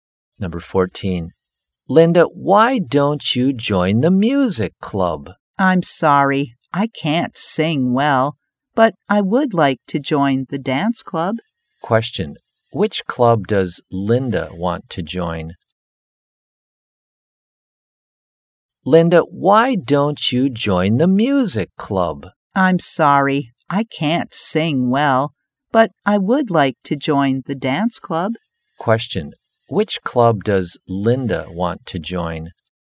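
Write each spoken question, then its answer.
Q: Question, which club does Linda want to join?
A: The dance club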